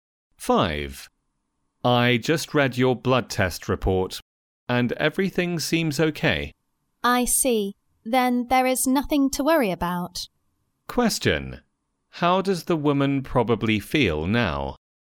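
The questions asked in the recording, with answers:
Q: How does the woman probably feel now?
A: Relieved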